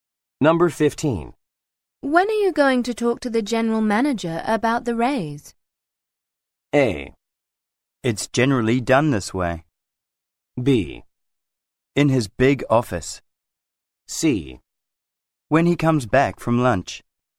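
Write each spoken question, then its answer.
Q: When are you going to talk to the general manager about the raise?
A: C: When he comes back from lunch.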